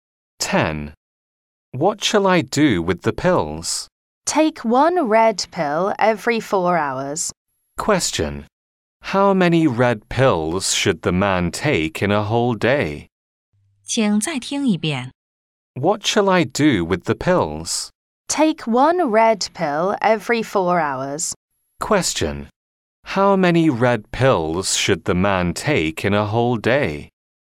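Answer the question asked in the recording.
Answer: Six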